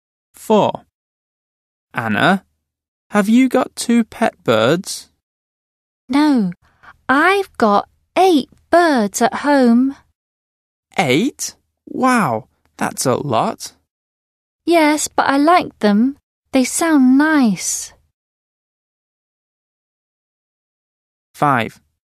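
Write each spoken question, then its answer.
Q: Anna, have you got 2 pet birds?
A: No, 8 birds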